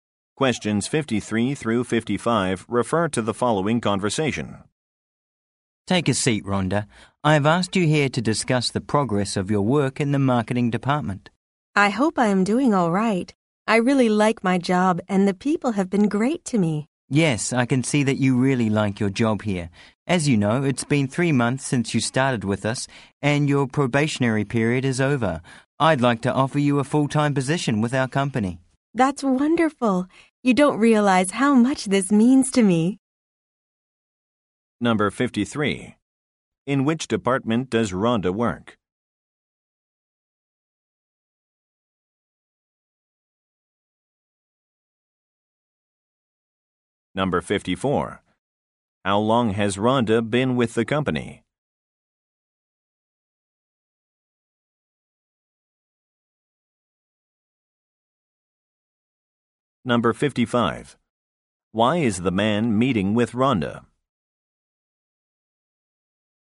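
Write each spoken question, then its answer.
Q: In which department does Rhonda work?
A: Marketing

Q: How long has Rhonda been with the company?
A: 3 months

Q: Why is the man meeting with Rhonda?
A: To offer her a full-time position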